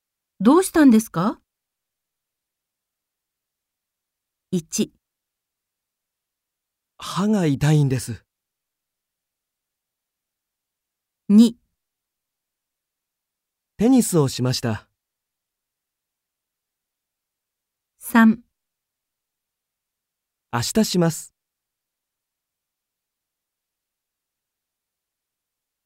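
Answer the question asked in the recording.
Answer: 1: 歯が痛いんです。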